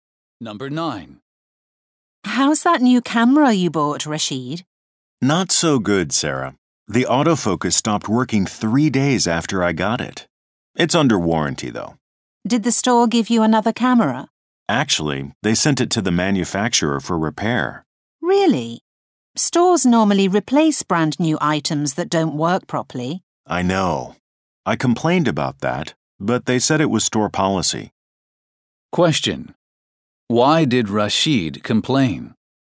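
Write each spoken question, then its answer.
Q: Why did Rashid complain?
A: The store sent the camera for repair instead of replacing it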